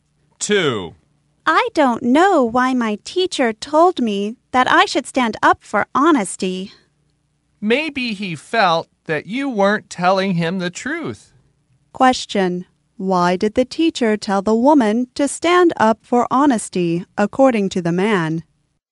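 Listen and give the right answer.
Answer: Maybe he felt she wasn't telling him the truth.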